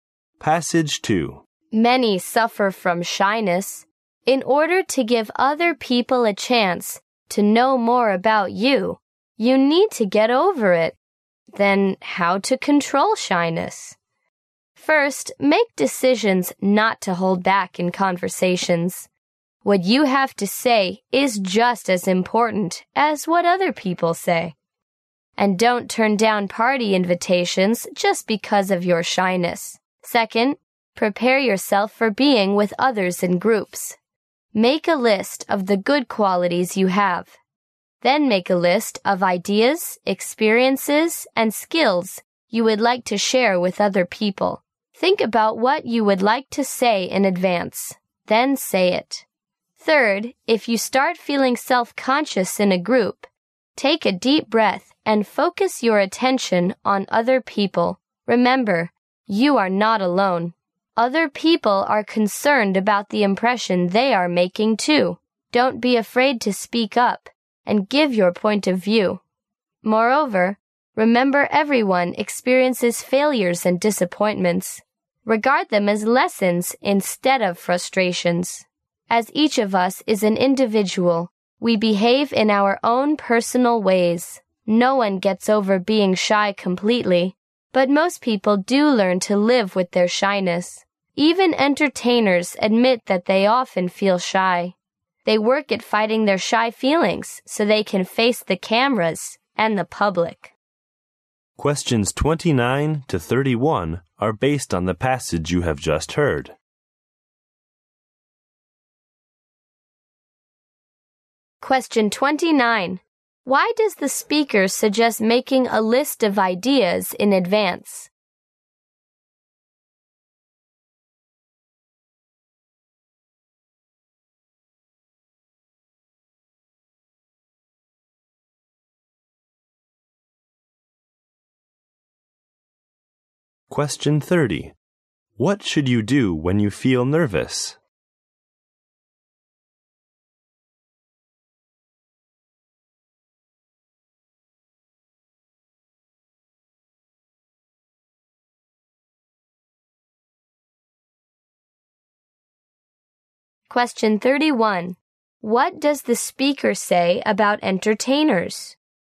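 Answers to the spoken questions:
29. To prepare for being with others in groups
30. Take a deep breath and focus on other people
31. They often feel shy too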